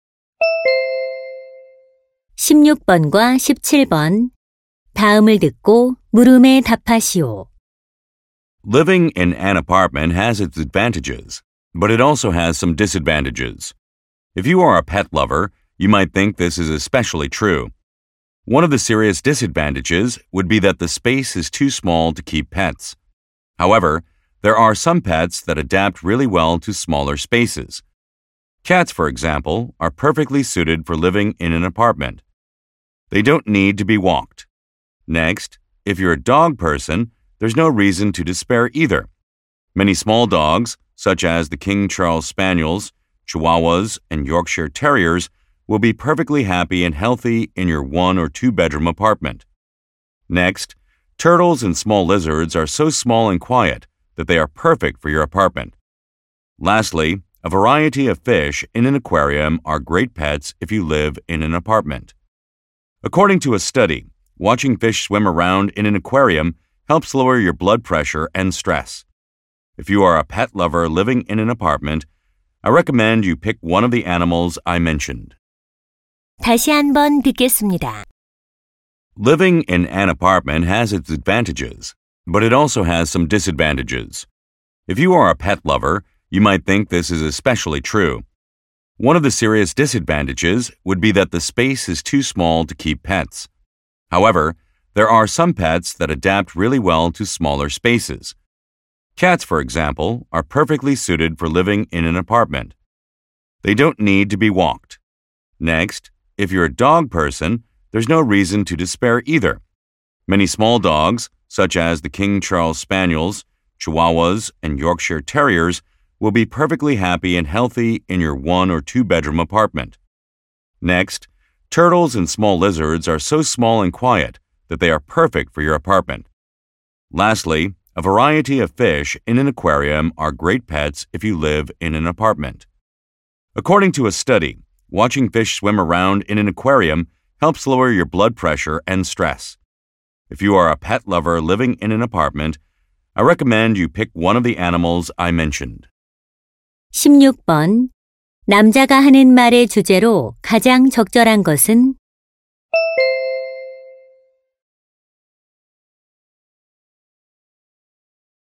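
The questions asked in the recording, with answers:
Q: 남자가 하는 말의 주제로 가장 적절한 것은?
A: 아파트에서 기르기에 적합한 애완동물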